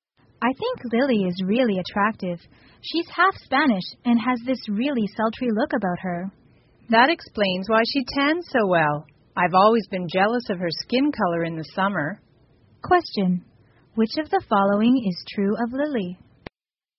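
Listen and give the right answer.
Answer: She is half Spanish and tans well.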